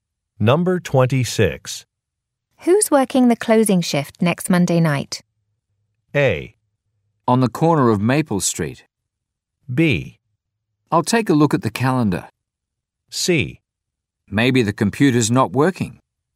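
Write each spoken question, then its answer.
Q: Who's working the closing shift next Monday night?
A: B: I'll take a look at the calendar.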